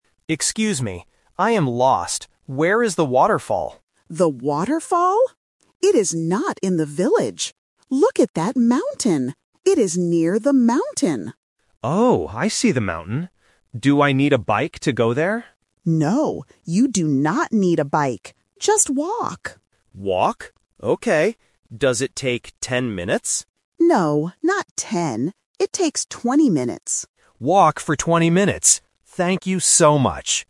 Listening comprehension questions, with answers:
Listen to the conversation and choose the correct answer (A, B, or C).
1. What is the hiker looking for?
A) The mountain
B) The waterfall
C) The river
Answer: The waterfall

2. How should the hiker go there?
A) By bike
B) By car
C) Walk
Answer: Walk

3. How many minutes does it take to get there?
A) 10 minutes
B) 20 minutes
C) 30 minutes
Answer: 20 minutes

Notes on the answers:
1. The hiker asks clearly, "Where is the waterfall?" Option (A) "The mountain" is a trap because the local mentions it ("Look at that mountain"), but it is only a landmark, not the place the hiker is looking for. Option (C) is a nature word but is not mentioned.
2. The local says, "Just walk." Option (A) "By bike" is a trap because the hiker asks "Do I need a bike?", but the local rejects it by saying "No, you do not need a bike." Option (B) is not mentioned.
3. The local corrects the hiker and states, "It takes twenty minutes." Option (A) "10 minutes" is a trap because the hiker guesses "Does it take ten minutes?", but the local says "No, not ten." Option (C) is not mentioned.

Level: A1

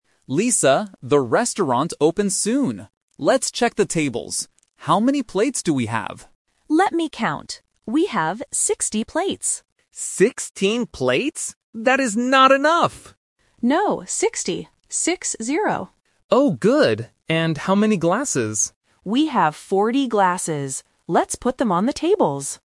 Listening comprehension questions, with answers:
Listen to the conversation between two waiters. Choose the correct answer (A, B, or C).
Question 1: What does Lisa count first?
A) Glasses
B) Spoons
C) Plates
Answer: Plates

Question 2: How many plates do they have?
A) 16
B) 60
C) 100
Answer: 60

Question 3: How many glasses do they have?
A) 40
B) 14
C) 60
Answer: 40

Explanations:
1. Tom asks, "How many plates do we have?" and Lisa counts them first.
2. Lisa clearly says they have 60 plates and spells it out as "Six-zero".
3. Lisa states clearly, "We have 40 glasses."

